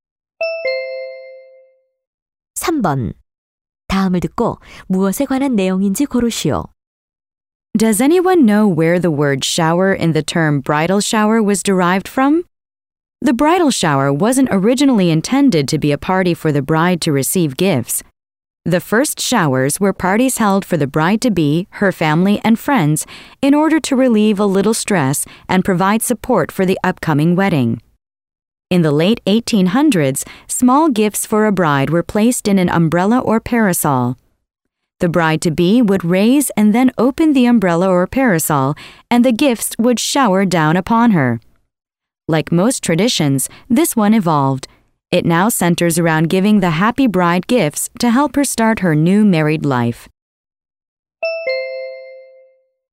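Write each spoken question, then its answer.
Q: 다음을 듣고 무엇에 관한 내용인지 고르시오.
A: 브라이덜 샤워의 유래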